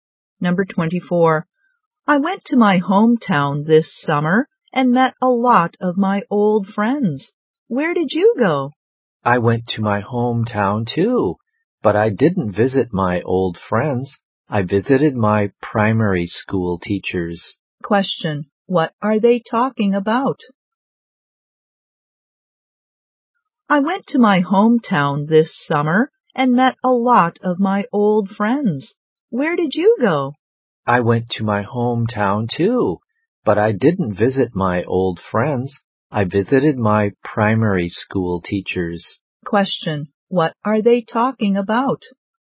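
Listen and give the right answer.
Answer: Their summer trips to their hometowns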